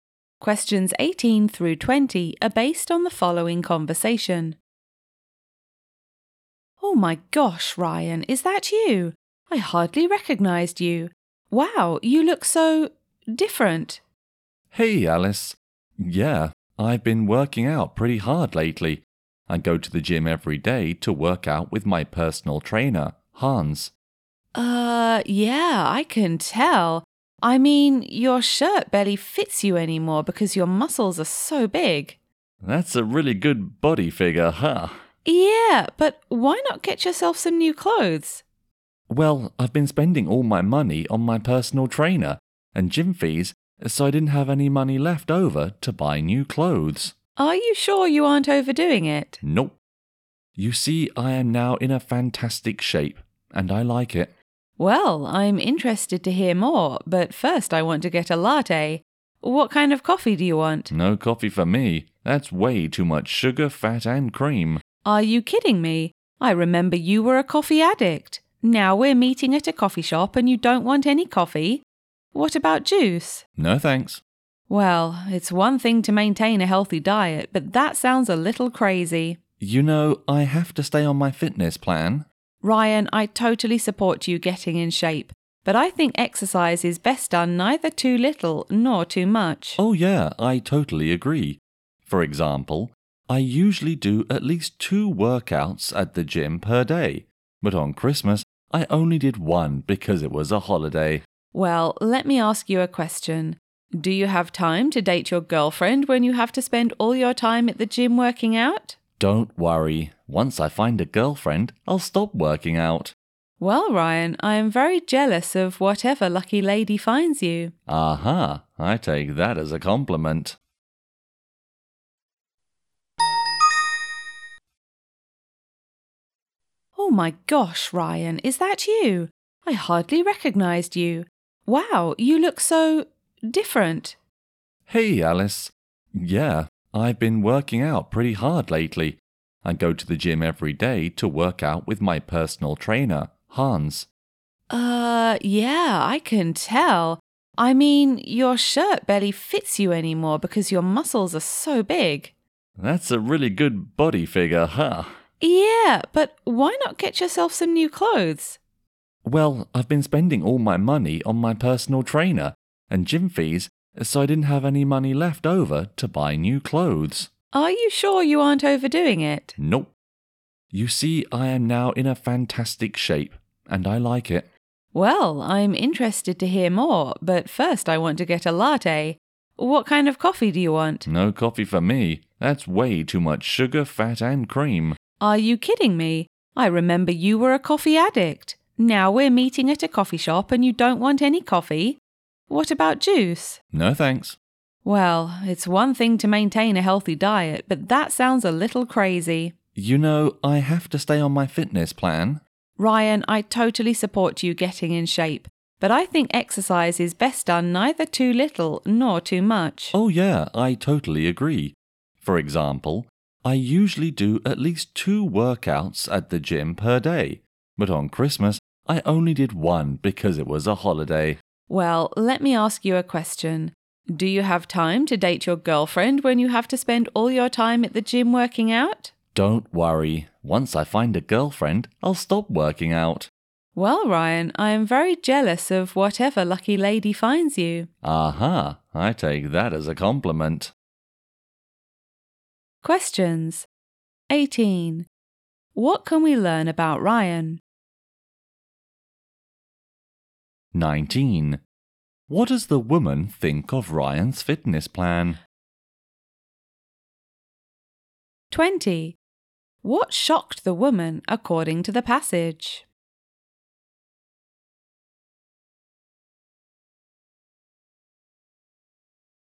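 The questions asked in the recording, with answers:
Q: What does the woman think of Ryan's fitness plan?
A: It is too much; he is overdoing it

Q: What shocked the woman, according to the passage?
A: Ryan, once a coffee addict, refused coffee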